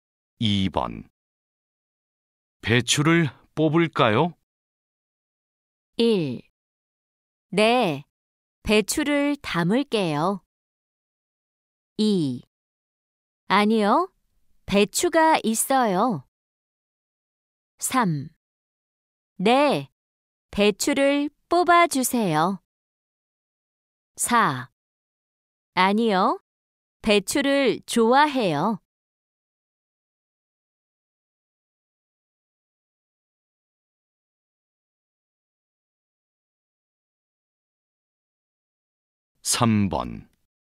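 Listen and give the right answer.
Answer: 3: 네, 배추를 뽑아주세요.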